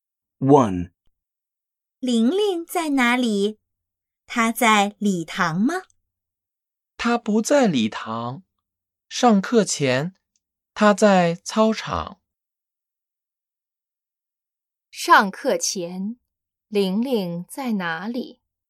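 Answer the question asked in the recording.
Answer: 在操场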